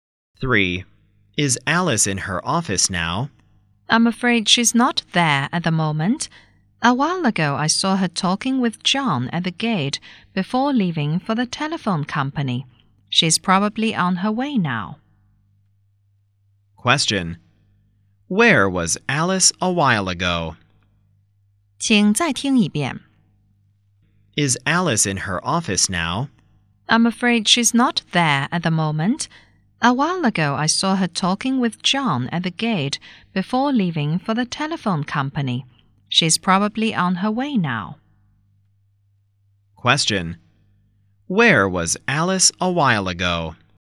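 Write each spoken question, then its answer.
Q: Question. Where was Alice a while ago?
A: At the gate, talking with John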